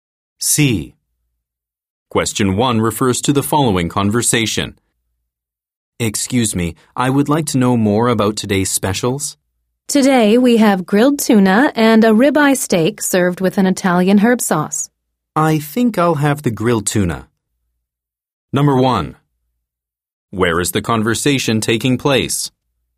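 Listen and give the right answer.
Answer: At a restaurant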